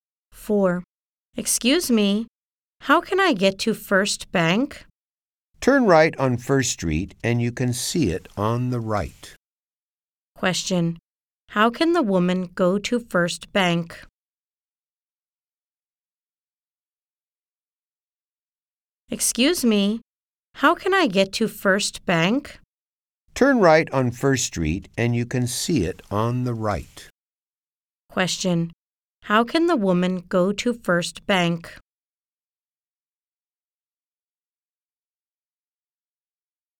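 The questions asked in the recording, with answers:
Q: Question. How can the woman go to First Bank?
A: Turn right on First Street; it's on the right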